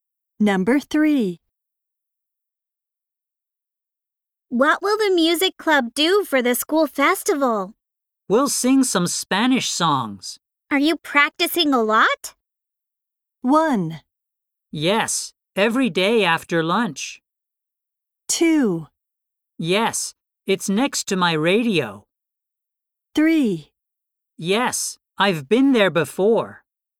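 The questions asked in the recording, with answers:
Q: Are you practicing a lot?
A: 1: Yes, every day after lunch.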